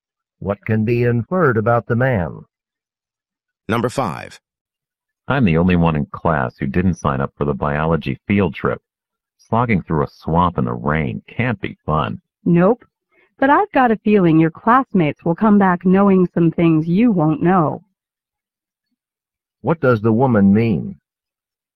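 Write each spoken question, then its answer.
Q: What does the woman mean?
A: The man will miss out on learning by skipping the field trip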